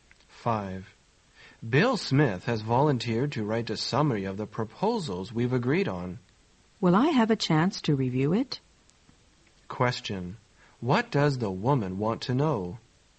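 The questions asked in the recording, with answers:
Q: What does the woman want to know?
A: Whether she can review the summary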